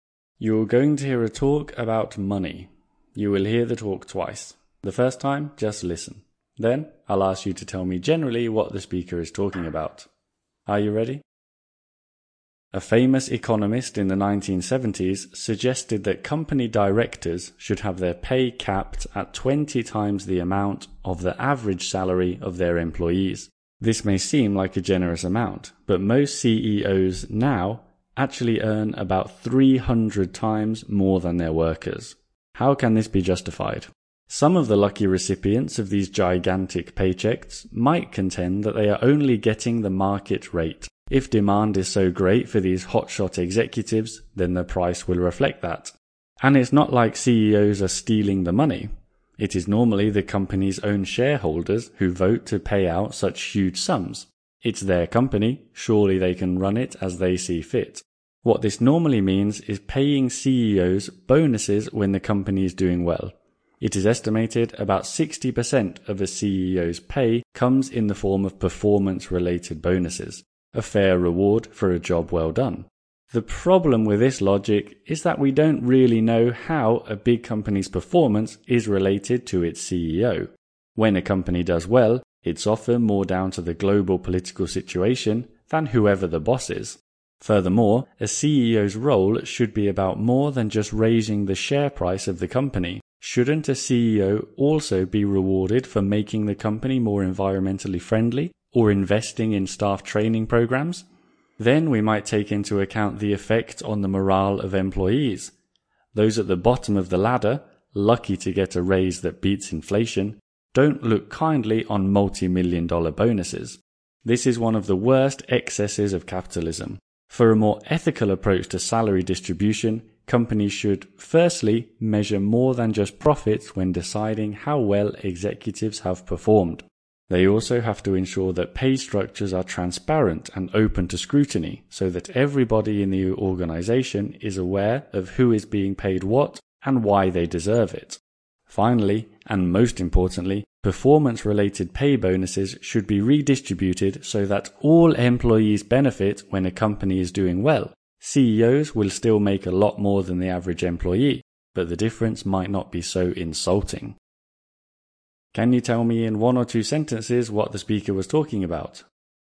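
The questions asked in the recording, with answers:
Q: Can you tell me in one or two sentences what the speaker was talking about?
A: Whether very high CEO pay can be justified. The speaker says it should be made fairer by judging performance on more than profit, making pay transparent and sharing bonuses with all employees.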